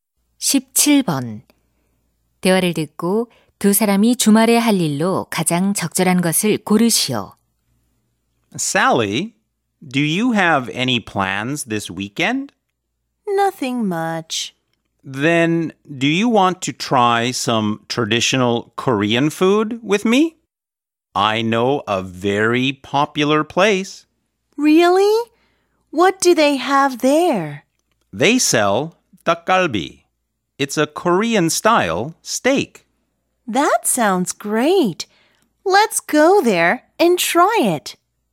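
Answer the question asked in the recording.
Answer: 한국 전통 음식(닭갈비) 먹기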